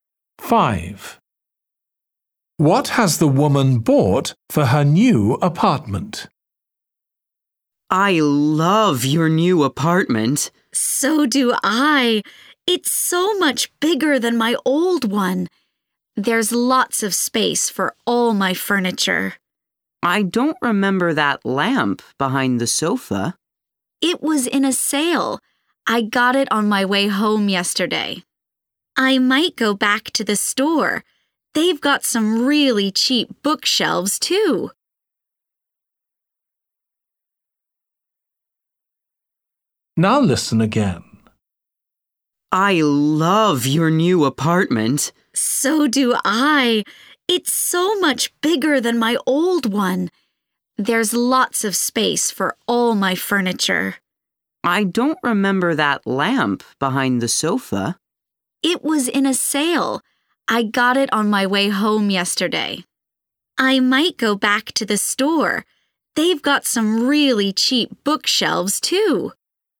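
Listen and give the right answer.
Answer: a lamp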